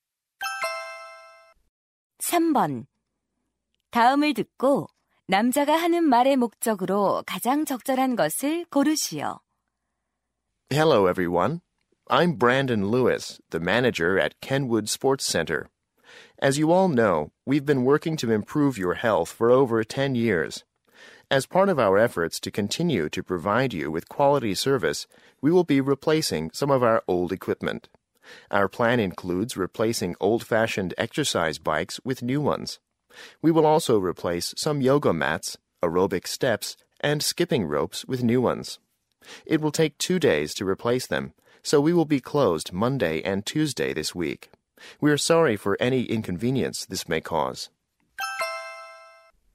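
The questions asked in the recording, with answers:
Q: 다음을 듣고 남자가 하는 말의 목적으로 가장 적절한 것을 고르시오.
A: 장비 교체로 인한 이틀간(월·화) 휴관을 알리려고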